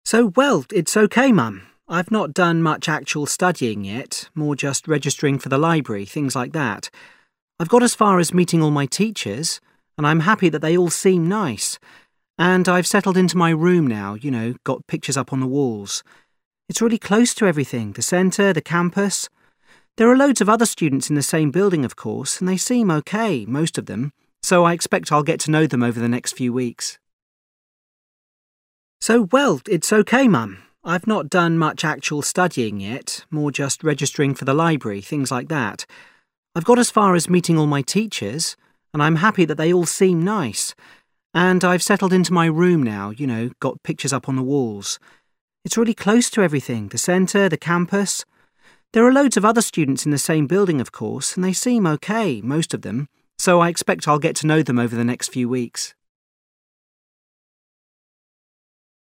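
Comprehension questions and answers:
Part 1: Listen to short texts and choose A,B, or C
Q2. You overhear a student talking on the phone. What does he say about life at college?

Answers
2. He is happy that his teachers all seem nice.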